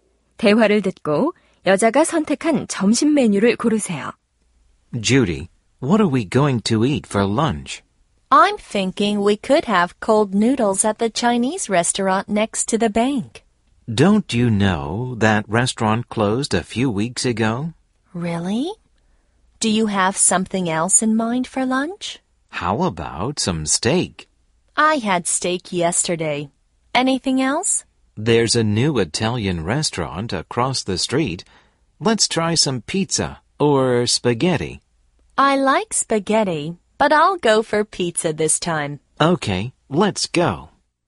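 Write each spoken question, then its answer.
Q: 대화를 듣고 여자가 선택한 점심 메뉴를 고르세요.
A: 피자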